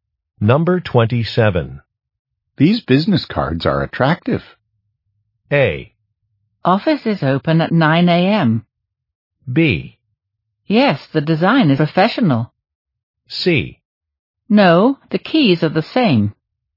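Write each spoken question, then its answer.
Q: These business cards are attractive.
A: B: Yes, the design is professional.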